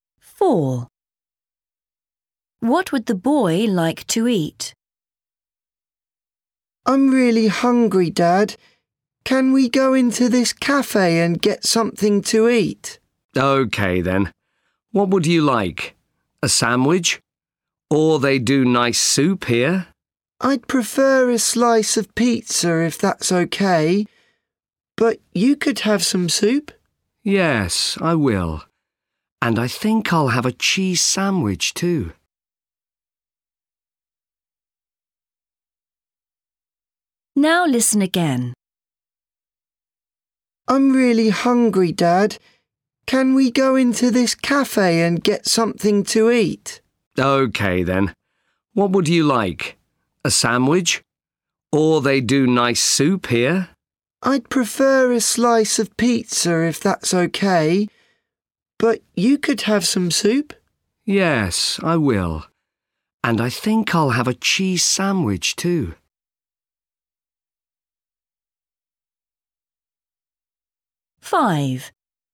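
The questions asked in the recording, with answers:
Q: What would the boy like to eat?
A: soup and a cheese sandwich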